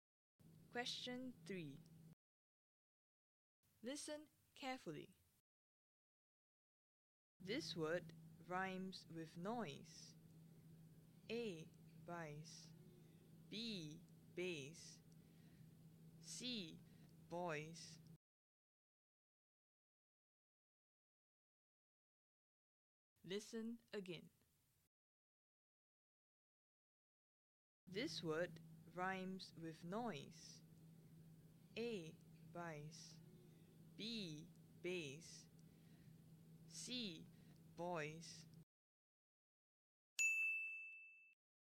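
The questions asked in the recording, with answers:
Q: This word rhymes with noise.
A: C: Boys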